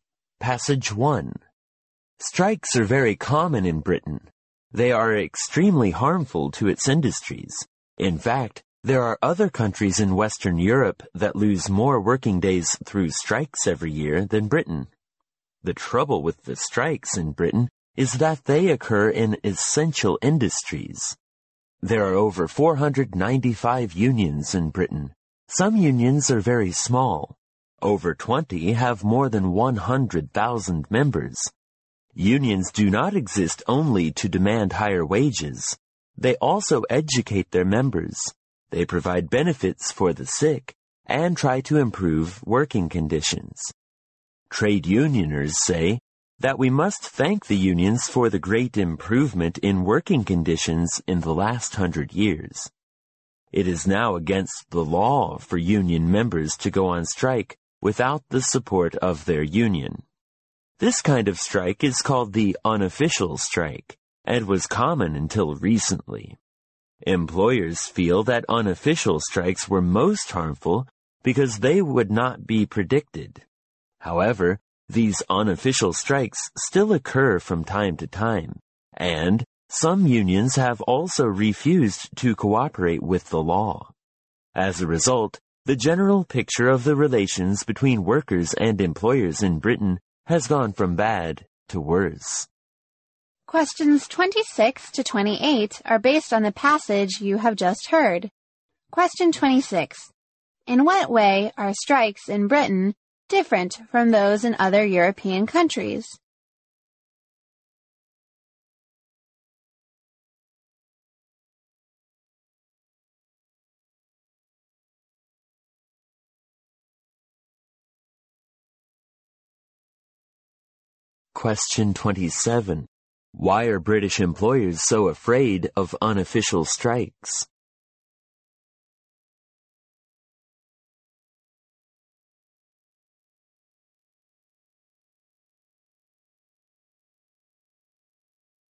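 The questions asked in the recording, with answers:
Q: In what way are strikes in Britain different from those in other European countries?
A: They occur in essential industries.

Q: Why are British employers so afraid of unofficial strikes?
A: They cannot be predicted.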